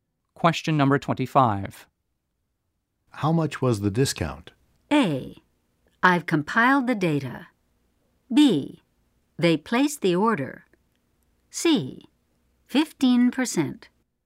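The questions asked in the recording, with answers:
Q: How much was the discount?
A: C: 15%.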